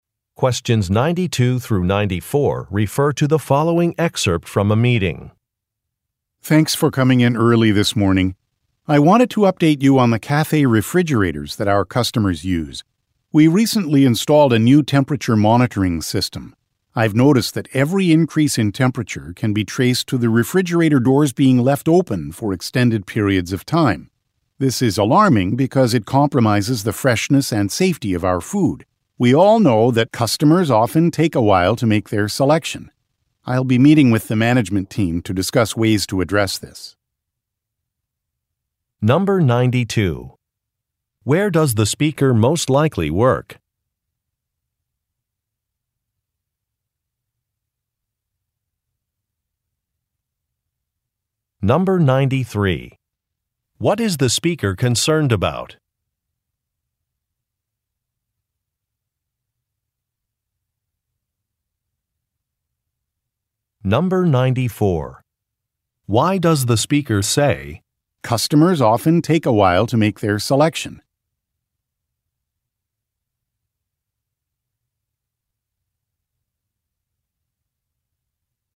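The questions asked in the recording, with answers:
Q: Where does the speaker most likely work?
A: At a cafe

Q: What is the speaker concerned about?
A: Refrigerator doors being left open, which raises the temperature and harms food freshness and safety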